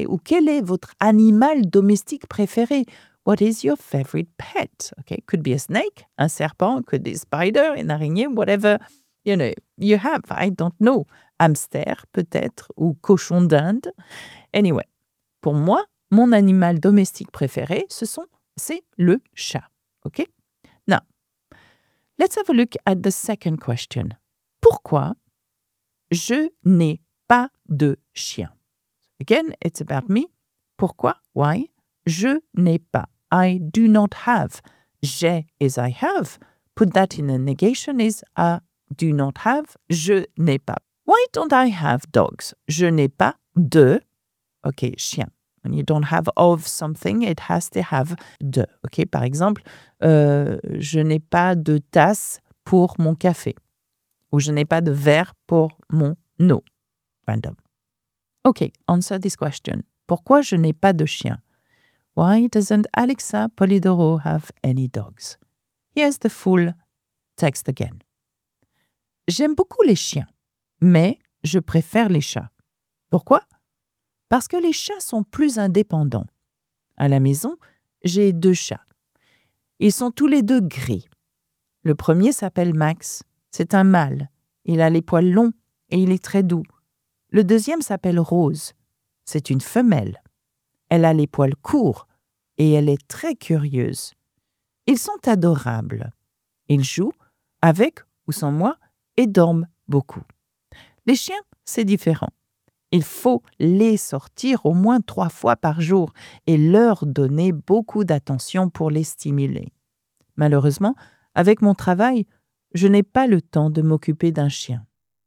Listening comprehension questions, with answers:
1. Pourquoi je n'ai pas de chiens ?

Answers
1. Parce que je n'ai pas le temps de m'occuper d'un chien.

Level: A1 - niveau découverte (beginner) / A2 -